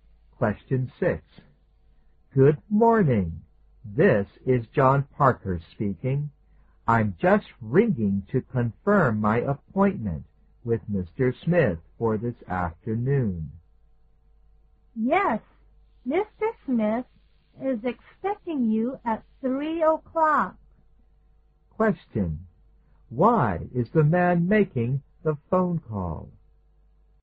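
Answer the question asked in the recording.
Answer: To confirm his appointment with Mr. Smith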